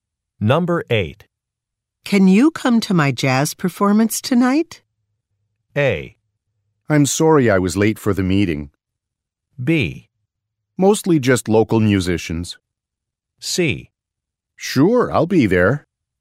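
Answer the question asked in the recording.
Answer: C: Sure, I'll be there.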